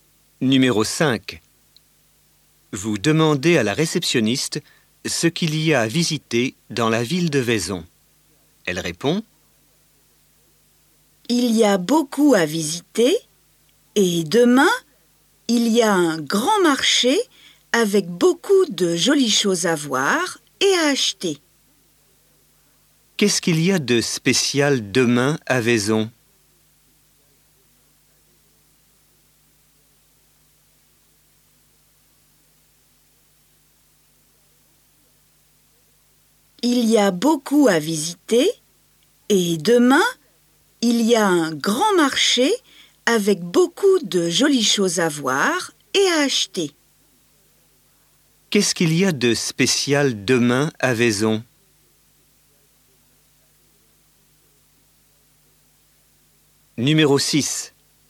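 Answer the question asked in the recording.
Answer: Un grand marché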